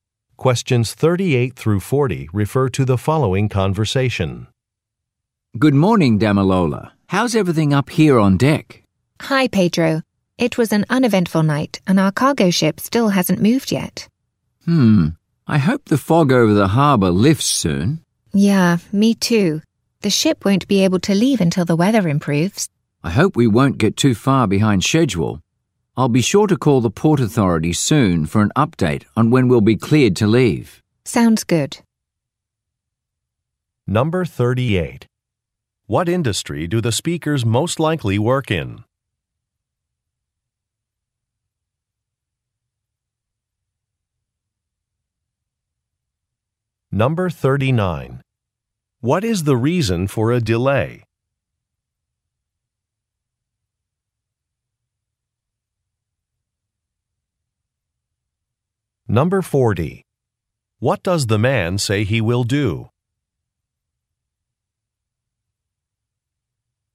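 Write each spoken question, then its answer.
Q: What industry do the speakers most likely work in?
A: Shipping

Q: What is the reason for a delay?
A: Fog over the harbor

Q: What does the man say he will do?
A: Call the Port Authority for an update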